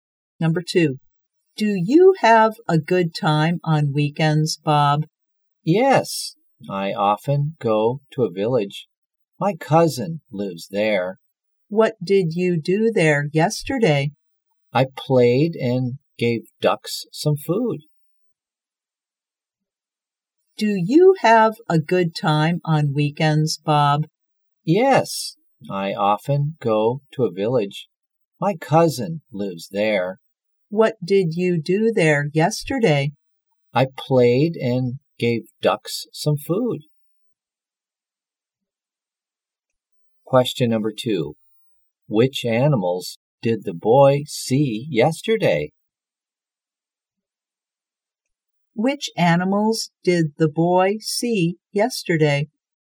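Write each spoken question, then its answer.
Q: Which animals did the boy see yesterday?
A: Ducks.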